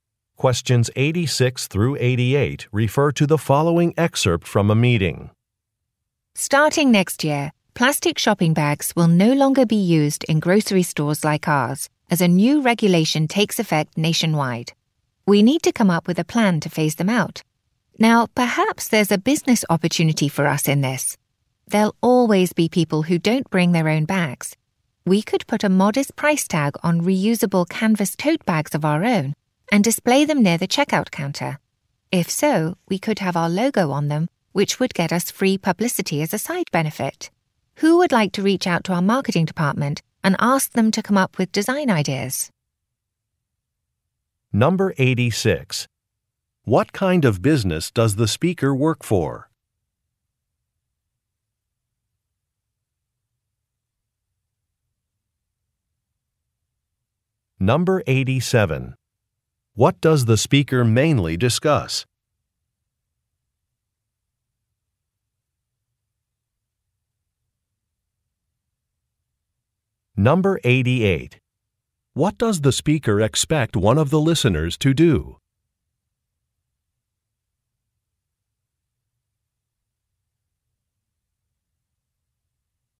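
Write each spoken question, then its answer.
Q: What kind of business does the speaker work for?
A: A grocery store

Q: What does the speaker expect one of the listeners to do?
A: Contact the marketing department for design ideas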